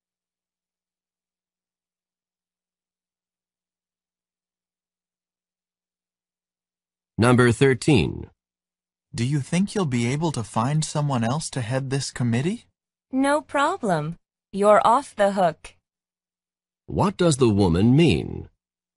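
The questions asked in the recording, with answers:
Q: What does the woman mean?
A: She will find someone else; he is free of the responsibility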